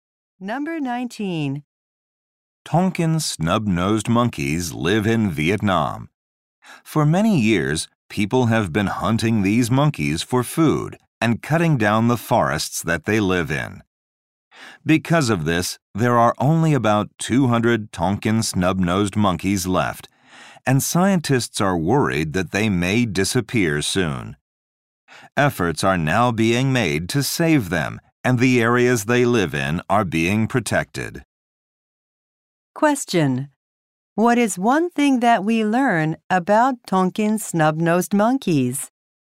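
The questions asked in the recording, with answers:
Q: What is one thing that we learn about Tonkin snub-nosed monkeys?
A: Only about 200 are left.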